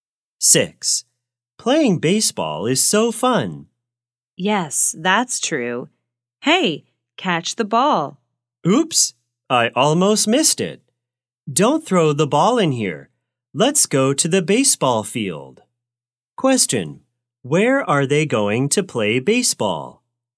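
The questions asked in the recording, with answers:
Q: Where are they going to play baseball?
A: At the baseball field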